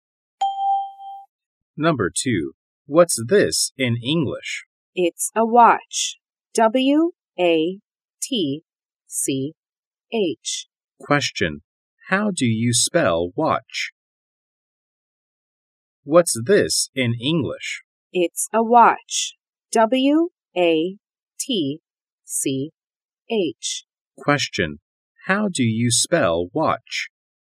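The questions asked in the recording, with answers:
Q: How do you spell watch?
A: W-A-T-C-H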